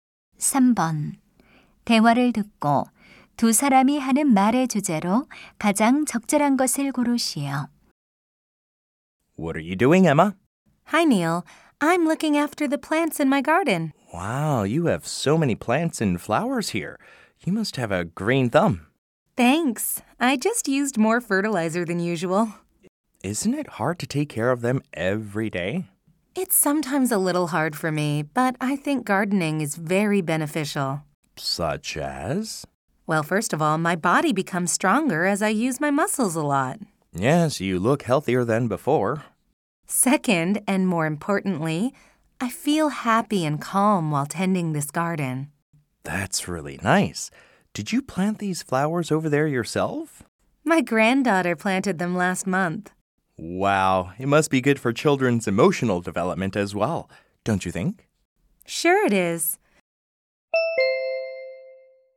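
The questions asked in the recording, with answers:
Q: 대화를 듣고 두 사람이 하는 말의 주제로 가장 적절한 것을 고르시오.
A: 가드닝(정원 가꾸기)의 이점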